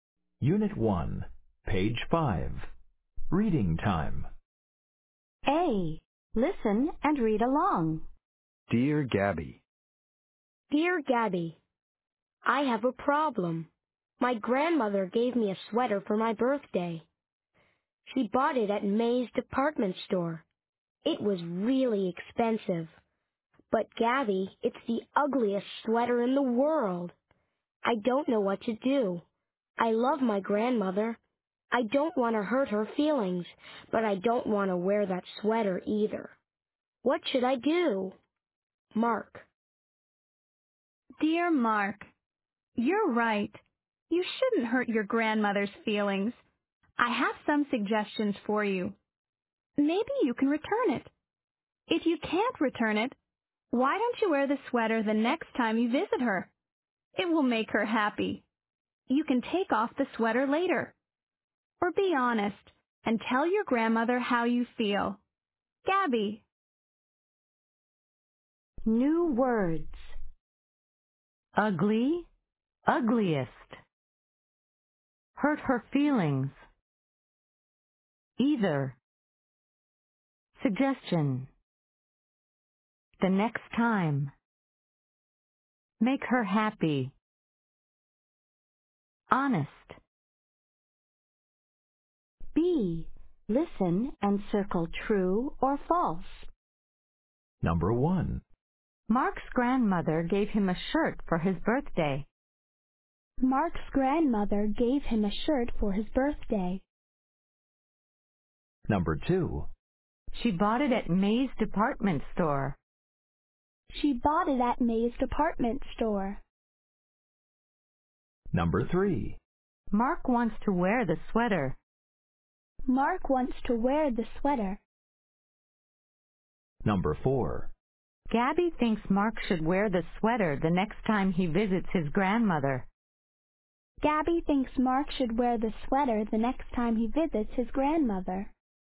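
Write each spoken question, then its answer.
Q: Mark's grandmother gave him a shirt for his birthday.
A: False

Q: She bought it at May's department store.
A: True

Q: Mark wants to wear the sweater.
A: False

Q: Gabby thinks Mark should wear the sweater the next time he visits his grandmother.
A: True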